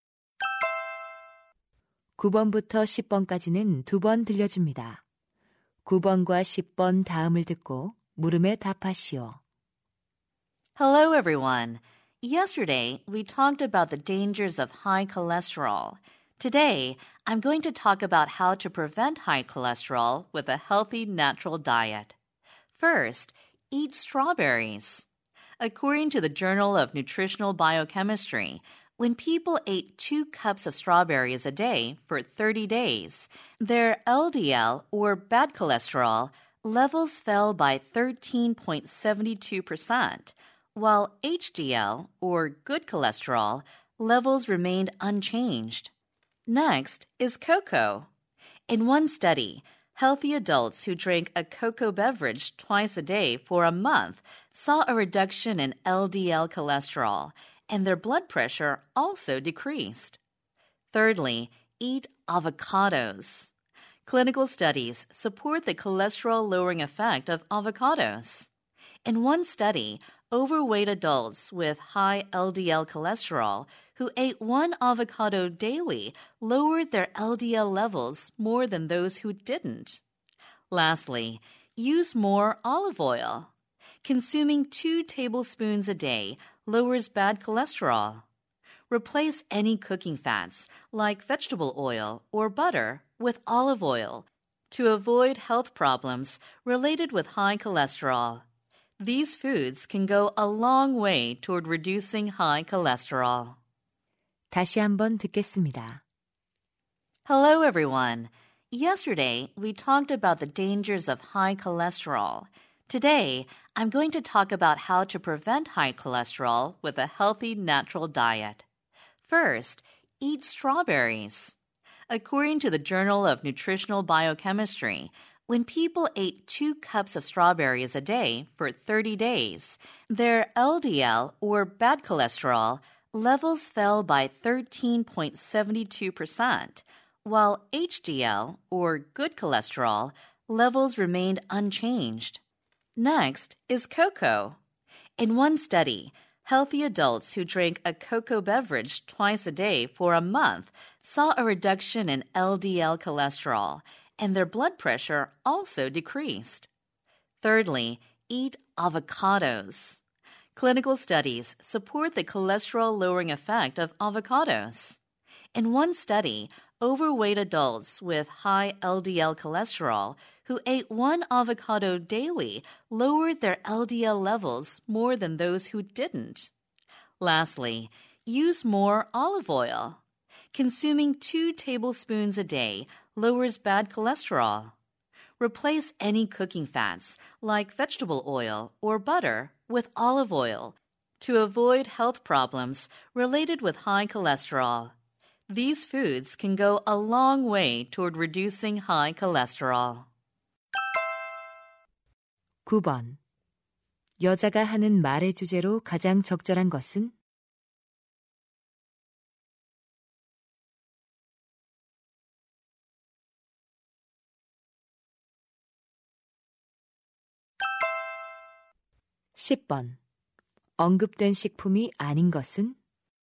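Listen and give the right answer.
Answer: 콜레스테롤을 낮추는 데 도움이 되는 식품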